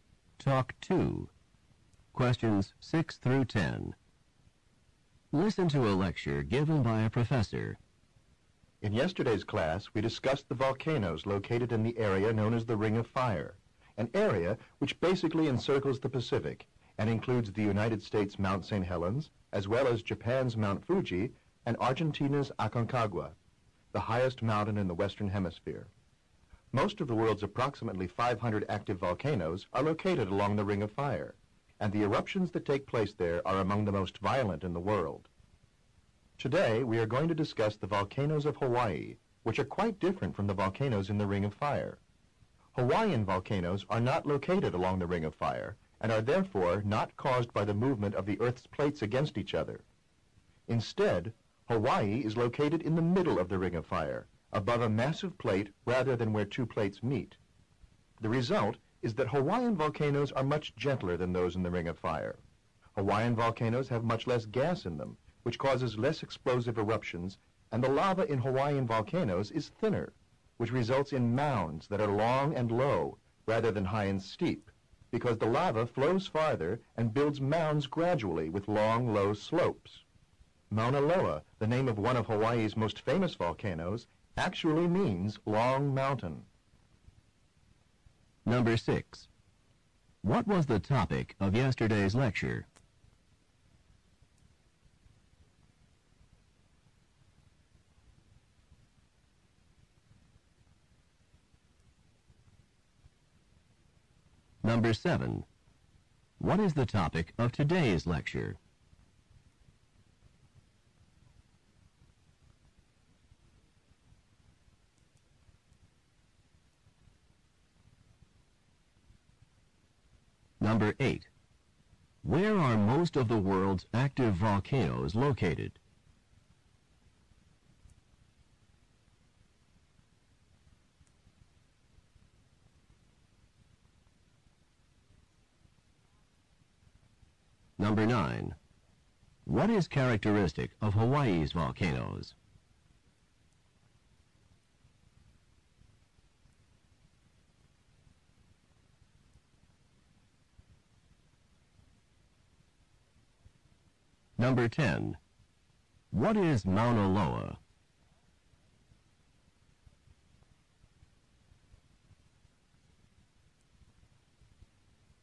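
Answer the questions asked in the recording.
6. Volcanoes of the Ring of Fire
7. Hawaiian volcanoes
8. Along the Ring of Fire
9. They are gentler, with less gas and thinner lava
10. A Hawaiian volcano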